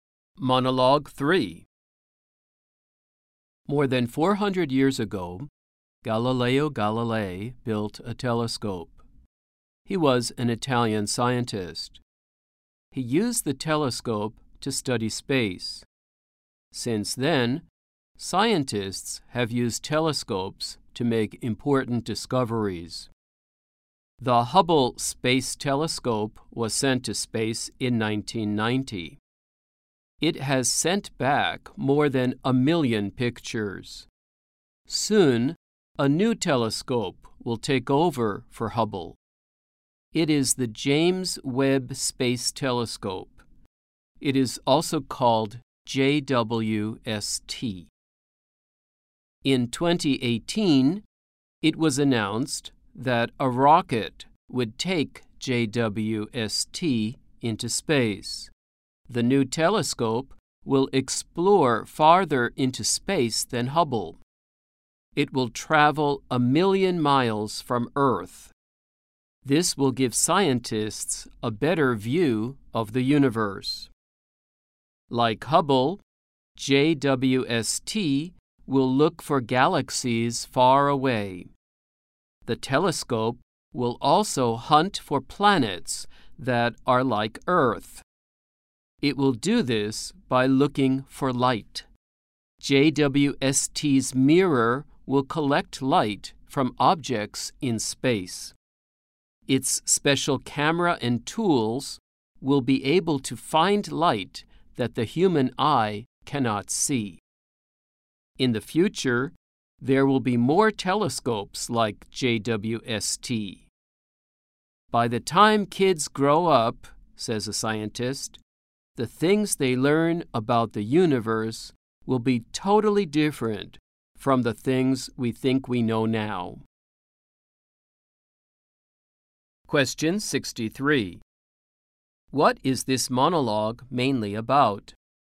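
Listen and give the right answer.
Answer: Space telescopes, especially the new James Webb Space Telescope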